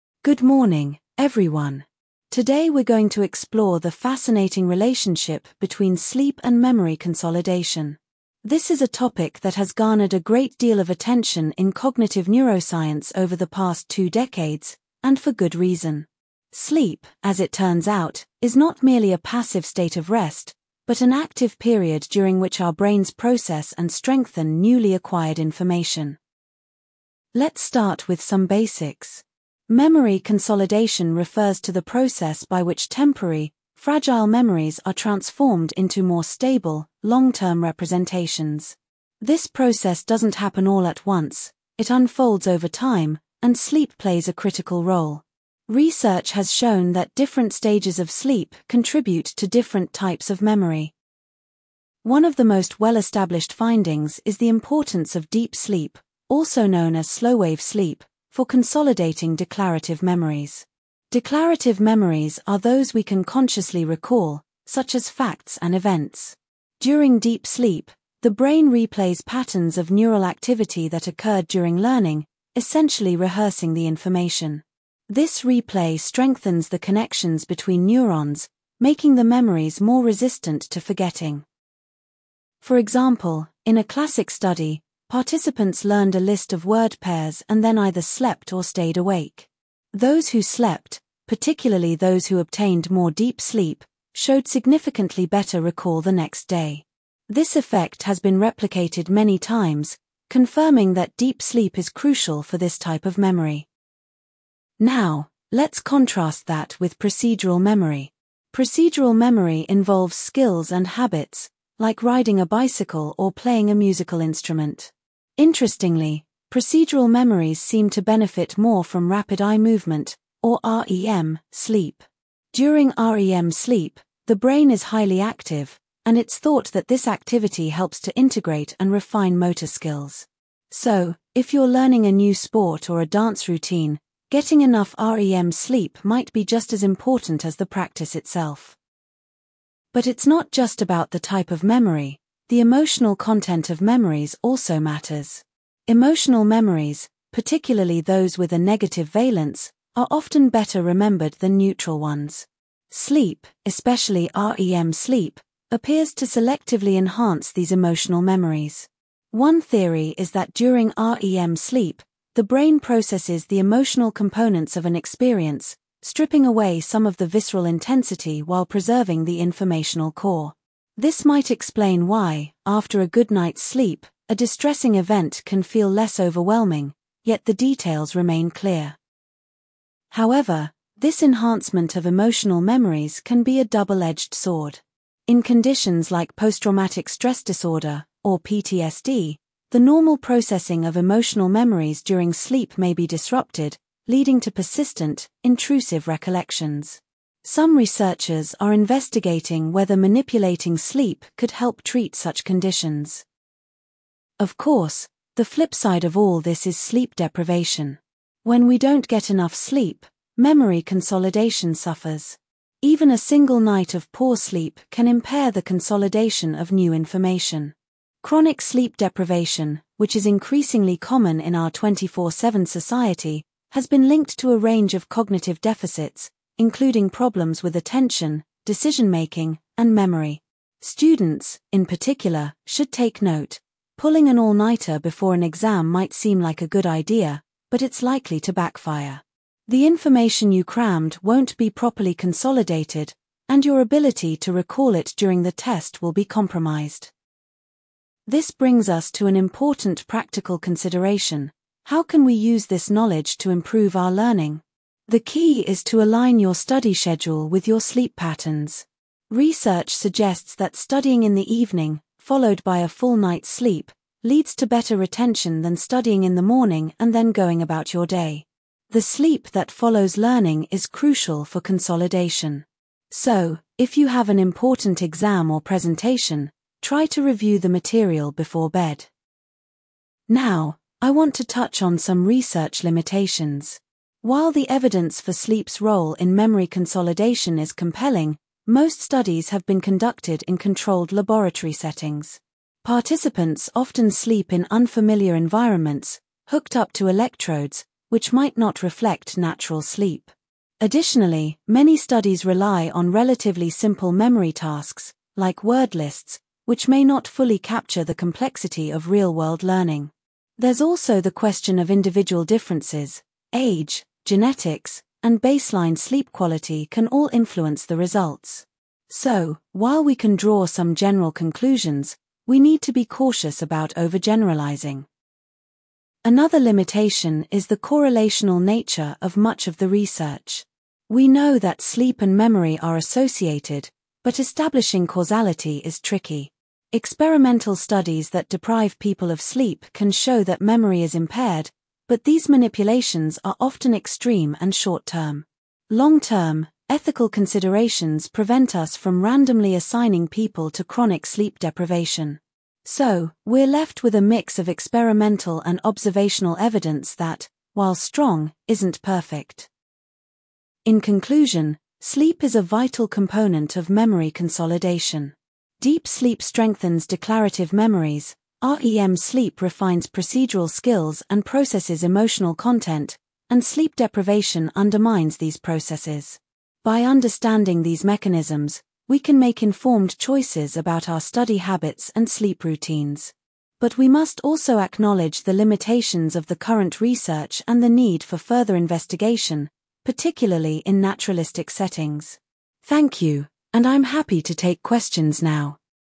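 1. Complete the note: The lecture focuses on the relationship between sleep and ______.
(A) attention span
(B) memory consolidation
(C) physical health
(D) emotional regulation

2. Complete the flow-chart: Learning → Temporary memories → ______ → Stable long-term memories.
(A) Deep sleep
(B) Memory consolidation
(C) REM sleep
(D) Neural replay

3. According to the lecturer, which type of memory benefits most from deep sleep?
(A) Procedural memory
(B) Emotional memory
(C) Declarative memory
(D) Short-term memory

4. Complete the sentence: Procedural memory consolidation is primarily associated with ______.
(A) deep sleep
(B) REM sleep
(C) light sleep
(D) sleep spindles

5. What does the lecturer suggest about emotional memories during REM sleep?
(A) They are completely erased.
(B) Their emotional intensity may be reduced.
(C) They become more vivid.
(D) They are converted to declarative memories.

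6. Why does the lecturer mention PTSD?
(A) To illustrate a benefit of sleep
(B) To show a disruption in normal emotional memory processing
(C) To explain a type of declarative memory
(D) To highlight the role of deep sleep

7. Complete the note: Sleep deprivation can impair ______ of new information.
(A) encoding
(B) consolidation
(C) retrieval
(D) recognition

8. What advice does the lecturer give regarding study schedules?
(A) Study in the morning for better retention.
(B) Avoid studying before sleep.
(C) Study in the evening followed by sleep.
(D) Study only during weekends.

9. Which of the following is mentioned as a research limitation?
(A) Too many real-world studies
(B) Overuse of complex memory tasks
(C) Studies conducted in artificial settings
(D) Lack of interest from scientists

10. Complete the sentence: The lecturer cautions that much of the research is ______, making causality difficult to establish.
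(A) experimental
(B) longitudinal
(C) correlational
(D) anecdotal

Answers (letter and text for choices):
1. (B) memory consolidation
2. (B) Memory consolidation
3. (C) Declarative memory
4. (B) REM sleep
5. (B) Their emotional intensity may be reduced.
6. (B) To show a disruption in normal emotional memory processing
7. (B) consolidation
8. (C) Study in the evening followed by sleep.
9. (C) Studies conducted in artificial settings
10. (C) correlational

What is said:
Good morning, everyone. Today we're going to explore the fascinating relationship between sleep and memory consolidation. This is a topic that has garnered a great deal of attention in cognitive neuroscience over the past two decades, and for good reason. Sleep, as it turns out, is not merely a passive state of rest, but an active period during which our brains process and strengthen newly acquired information.
Let's start with some basics. 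Memory consolidation refers to the process by which temporary, fragile memories are transformed into more stable, long-term representations. This process doesn't happen all at once; it unfolds over time, and sleep plays a critical role. Research has shown that different stages of sleep contribute to different types of memory.
One of the most well-established findings is the importance of deep sleep, also known as slow-wave sleep, for consolidating declarative memories. Declarative memories are those we can consciously recall, such as facts and events. During deep sleep, the brain replays patterns of neural activity that occurred during learning, essentially rehearsing the information. This replay strengthens the connections between neurons, making the memories more resistant to forgetting.
For example, in a classic study, participants learned a list of word pairs and then either slept or stayed awake. 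Those who slept, particularly those who obtained more deep sleep, showed significantly better recall the next day. This effect has been replicated many times, confirming that deep sleep is crucial for this type of memory.
Now, let's contrast that with procedural memory. Procedural memory involves skills and habits, like riding a bicycle or playing a musical instrument. Interestingly, procedural memories seem to benefit more from rapid eye movement, or REM, sleep. During REM sleep, the brain is highly active, and it's thought that this activity helps to integrate and refine motor skills. So, if you're learning a new sport or a dance routine, getting enough REM sleep might be just as important as the practice itself.
But it's not just about the type of memory; the emotional content of memories also matters. Emotional memories, particularly those with a negative valence, are often better remembered than neutral ones. 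Sleep, especially REM sleep, appears to selectively enhance these emotional memories. One theory is that during REM sleep, the brain processes the emotional components of an experience, stripping away some of the visceral intensity while preserving the informational core. This might explain why, after a good night's sleep, a distressing event can feel less overwhelming, yet the details remain clear.
However, this enhancement of emotional memories can be a double-edged sword. In conditions like post-traumatic stress disorder, or PTSD, the normal processing of emotional memories during sleep may be disrupted, leading to persistent, intrusive recollections. Some researchers are investigating whether manipulating sleep could help treat such conditions.
Of course, the flip side of all this is sleep deprivation. When we don't get enough sleep, memory consolidation suffers. Even a single night of poor sleep can impair the consolidation of new information. 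Chronic sleep deprivation, which is increasingly common in our 24/7 society, has been linked to a range of cognitive deficits, including problems with attention, decision-making, and memory. Students, in particular, should take note: pulling an all-nighter before an exam might seem like a good idea, but it's likely to backfire. The information you crammed won't be properly consolidated, and your ability to recall it during the test will be compromised.
This brings us to an important practical consideration: how can we use this knowledge to improve our learning? The key is to align your study schedule with your sleep patterns. Research suggests that studying in the evening, followed by a full night's sleep, leads to better retention than studying in the morning and then going about your day. The sleep that follows learning is crucial for consolidation. So, if you have an important exam or presentation, try to review the material before bed.
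Now, I want to touch on some research limitations. While the evidence for sleep's role in memory consolidation is compelling, most studies have been conducted in controlled laboratory settings. Participants often sleep in unfamiliar environments, hooked up to electrodes, which might not reflect natural sleep. Additionally, many studies rely on relatively simple memory tasks, like word lists, which may not fully capture the complexity of real-world learning. There's also the question of individual differences: age, genetics, and baseline sleep quality can all influence the results. So, while we can draw some general conclusions, we need to be cautious about overgeneralising.
Another limitation is the correlational nature of much of the research. We know that sleep and memory are associated, but establishing causality is tricky. Experimental studies that deprive people of sleep can show that memory is impaired, but these manipulations are often extreme and short-term. 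Long-term, ethical considerations prevent us from randomly assigning people to chronic sleep deprivation. So, we're left with a mix of experimental and observational evidence that, while strong, isn't perfect.
In conclusion, sleep is a vital component of memory consolidation. Deep sleep strengthens declarative memories, REM sleep refines procedural skills and processes emotional content, and sleep deprivation undermines these processes. By understanding these mechanisms, we can make informed choices about our study habits and sleep routines. But we must also acknowledge the limitations of the current research and the need for further investigation, particularly in naturalistic settings. Thank you, and I'm happy to take questions now.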